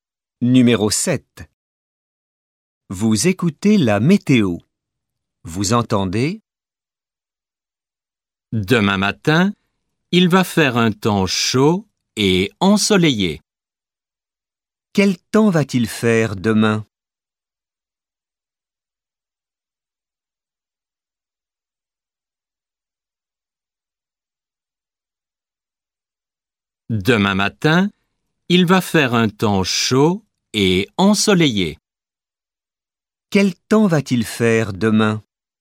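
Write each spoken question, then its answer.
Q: Quel temps va-t-il faire demain?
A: Chaud et ensoleillé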